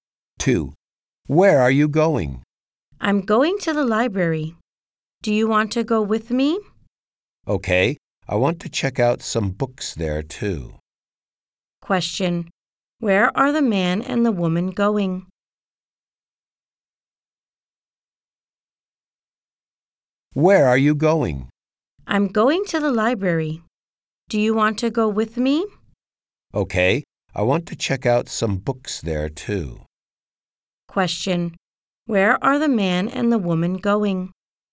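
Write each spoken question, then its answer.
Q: Where are the man and the woman going?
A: To the library.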